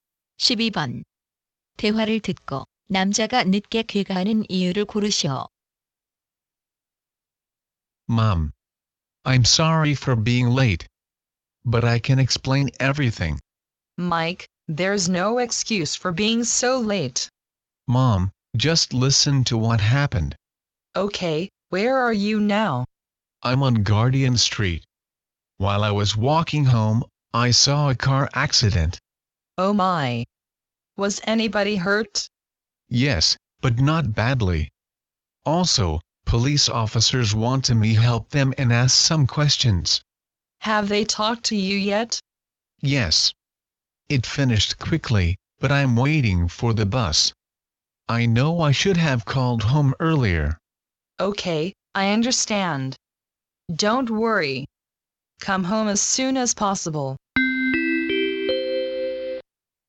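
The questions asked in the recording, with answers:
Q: 대화를 듣고 남자가 늦게 귀가하는 이유를 고르시오.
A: 교통사고를 목격해 경찰의 질문에 답해야 해서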